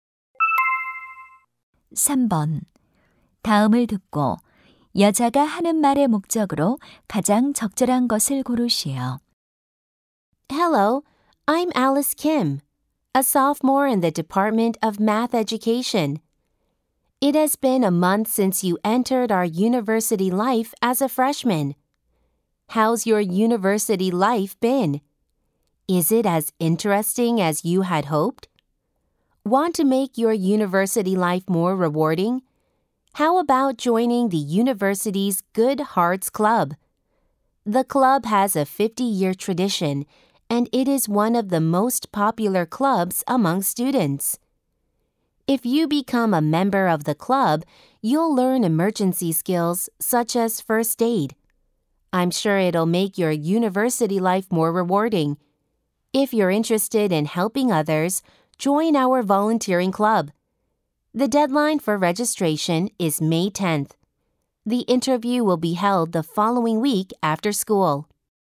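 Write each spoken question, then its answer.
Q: 다음을 듣고 여자가 하는 말의 목적으로 가장 적절한 것을 고르시오.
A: 봉사 동아리(Good Hearts Club) 가입을 권유하려고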